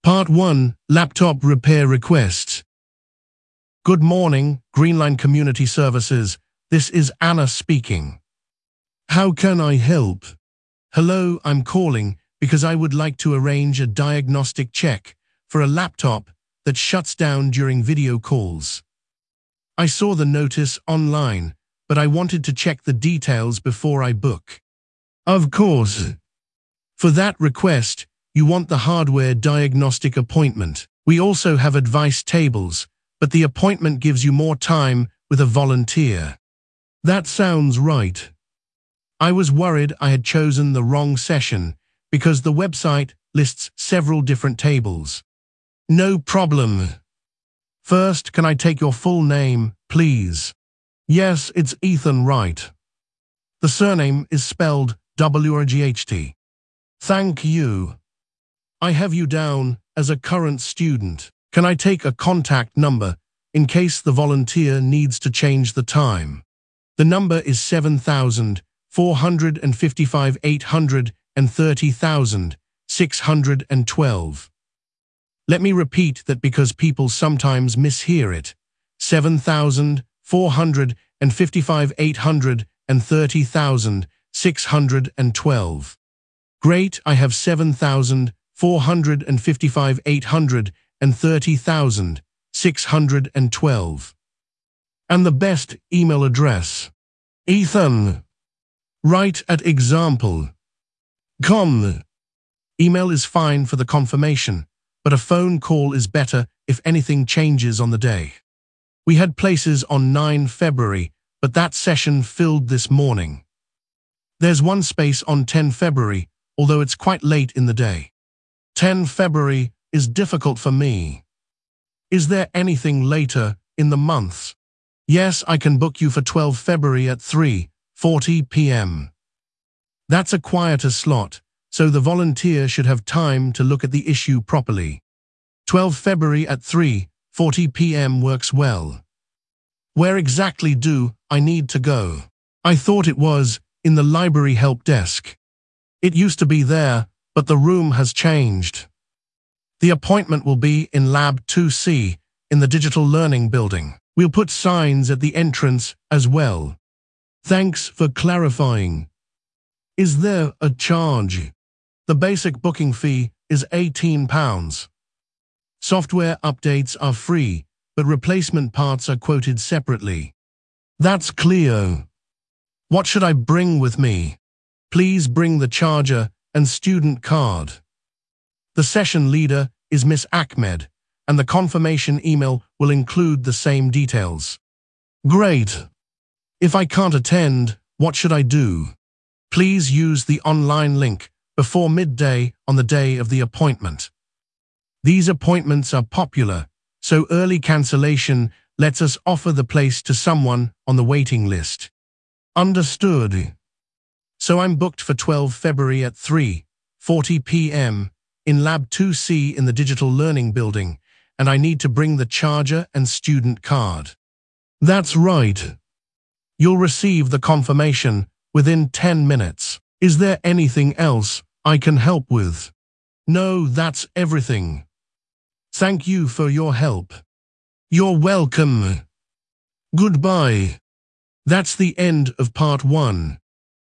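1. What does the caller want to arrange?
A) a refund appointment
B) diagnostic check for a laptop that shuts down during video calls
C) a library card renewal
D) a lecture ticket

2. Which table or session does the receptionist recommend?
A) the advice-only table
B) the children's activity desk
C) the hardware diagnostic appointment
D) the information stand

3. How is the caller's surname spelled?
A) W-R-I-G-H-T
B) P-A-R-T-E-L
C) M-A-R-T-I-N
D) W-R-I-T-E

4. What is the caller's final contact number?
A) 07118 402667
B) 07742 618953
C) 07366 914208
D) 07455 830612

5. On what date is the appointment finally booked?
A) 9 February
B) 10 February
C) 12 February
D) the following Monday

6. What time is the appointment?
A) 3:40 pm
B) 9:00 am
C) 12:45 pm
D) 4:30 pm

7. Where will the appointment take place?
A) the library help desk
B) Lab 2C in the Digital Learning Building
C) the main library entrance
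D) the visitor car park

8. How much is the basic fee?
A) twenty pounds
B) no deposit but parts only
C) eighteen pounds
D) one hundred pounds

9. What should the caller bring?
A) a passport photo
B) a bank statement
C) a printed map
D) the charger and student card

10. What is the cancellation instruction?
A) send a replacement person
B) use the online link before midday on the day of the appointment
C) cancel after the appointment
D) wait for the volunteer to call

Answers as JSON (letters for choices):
{"1": "B", "2": "C", "3": "A", "4": "D", "5": "C", "6": "A", "7": "B", "8": "C", "9": "D", "10": "B"}

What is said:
Receptionist: Good morning, Greenline Community Services, this is Anna speaking. How can I help?
Caller: Hello, I am calling because I would like to arrange a diagnostic check for a laptop that shuts down during video calls. I saw the notice online, but I wanted to check the details before I book.
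Receptionist: Of course. For that request, you want the hardware diagnostic appointment. We also have advice tables, but the appointment gives you more time with a volunteer.
Caller: That sounds right. I was worried I had chosen the wrong session because the website lists several different tables.
Receptionist: No problem. First, can I take your full name, please?
Caller: Yes, it is Ethan Wright. The surname is spelled W-R-I-G-H-T.
Receptionist: Thank you. I have you down as a current student. Can I take a contact number in case the volunteer needs to change the time?
Caller: The number is 07455 830612. Let me repeat that because people sometimes mishear it: 07455 830612.
Receptionist: Great, I have 07455 830612. And the best email address?
Caller: ethan.wright@example.com. Email is fine for the confirmation, but a phone call is better if anything changes on the day.
Receptionist: We had places on 9 February, but that session filled this morning. 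There is one space on 10 February, although it is quite late in the day.
Caller: 10 February is difficult for me. Is there anything later in the month?
Receptionist: Yes, I can book you for 12 February at 3:40 pm. That is a quieter slot, so the volunteer should have time to look at the issue properly.
Where exactly do I need to go? I thought it was in the library help desk.
Receptionist: It used to be there, but the room has changed. The appointment will be in Lab 2C in the Digital Learning Building. We will put signs at the entrance as well.
Caller: Thanks for clarifying. Is there a charge?
Receptionist: The basic booking fee is eighteen pounds. Software updates are free, but replacement parts are quoted separately.
Caller: That is clear. What should I bring with me?
Receptionist: Please bring the charger and student card. The session leader is Ms. Ahmed, and the confirmation email will include the same details.
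Caller: Great. If I cannot attend, what should I do?
Receptionist: Please use the online link before midday on the day of the appointment. These appointments are popular, so early cancellation lets us offer the place to someone on the waiting list.
Caller: Understood.
Is there anything else I can help with?
Caller: No, that is everything. Thank you for your help.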